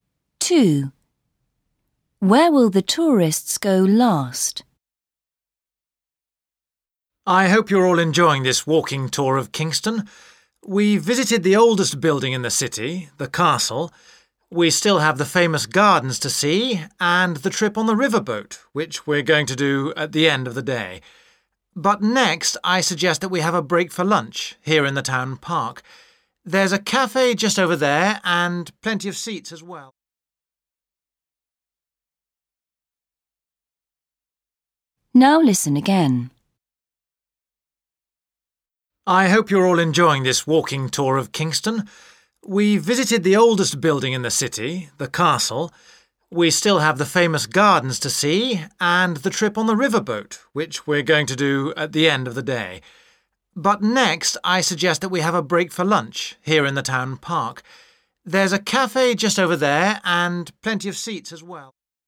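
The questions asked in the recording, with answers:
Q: Where will the tourists go last?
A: On the riverboat trip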